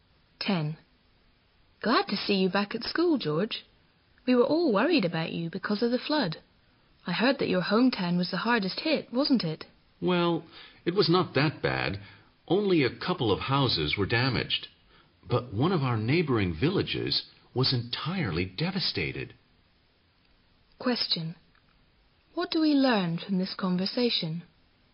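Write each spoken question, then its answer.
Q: What do we learn from this conversation?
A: George's hometown was not badly hit; a neighboring village was devastated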